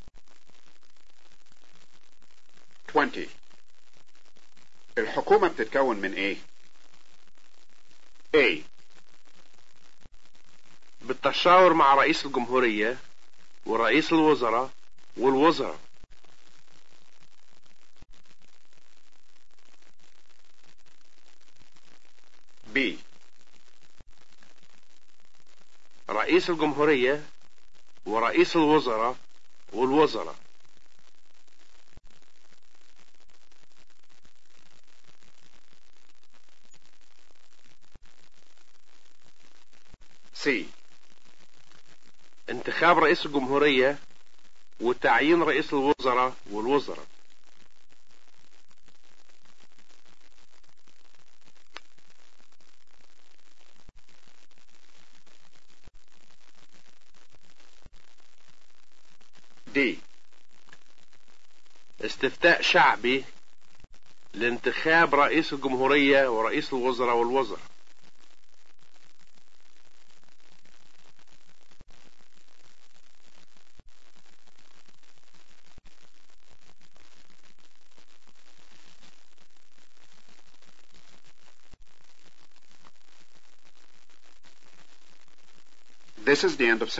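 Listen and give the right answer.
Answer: B: رئيس الجمهورية ورئيس الوزراء والوزراء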